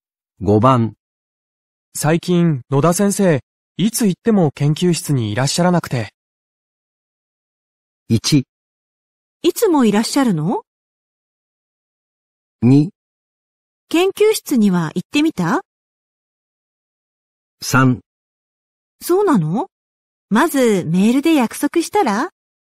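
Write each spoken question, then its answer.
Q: 最近、野田先生、いつ行っても研究室にいらっしゃらなくて。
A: 3: そうなの?まず、メールで約束したら?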